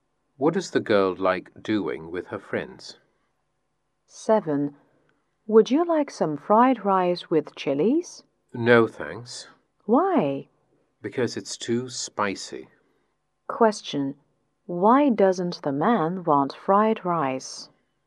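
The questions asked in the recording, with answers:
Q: Why doesn't the man want fried rice?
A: Because it's too spicy.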